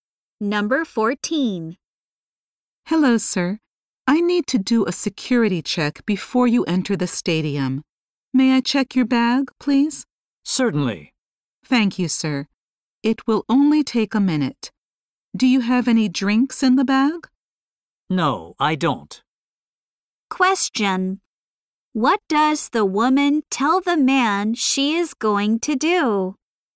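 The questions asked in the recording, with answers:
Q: What does the woman tell the man she is going to do?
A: Check his bag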